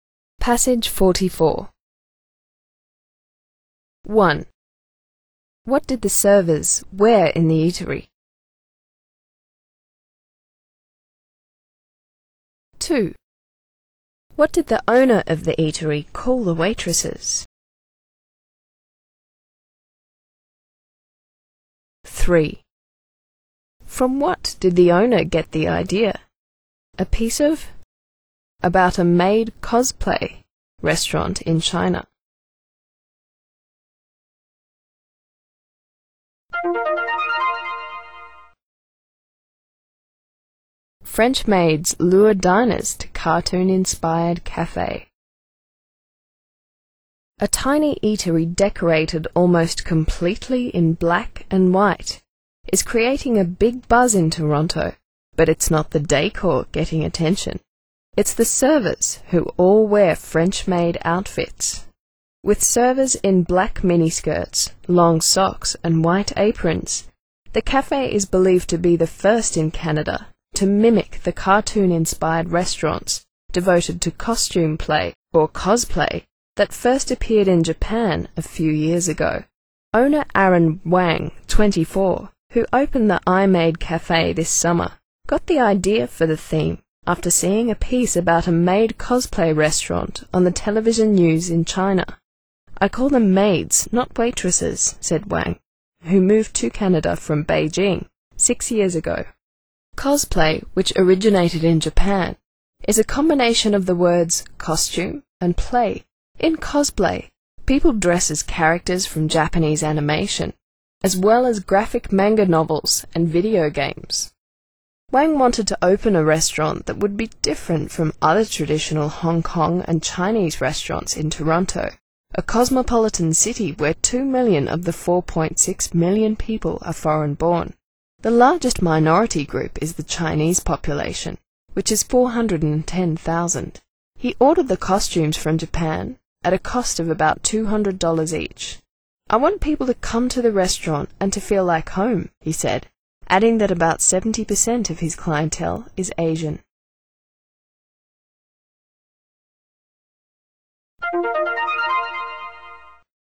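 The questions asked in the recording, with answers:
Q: What did the servers wear in the eatery?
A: French maid outfits (black miniskirts, long socks and white aprons)

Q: What did the owner of the eatery call the waitresses?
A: Maids

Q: From what did the owner get the idea?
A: A piece on the TV news in China about a maid cosplay restaurant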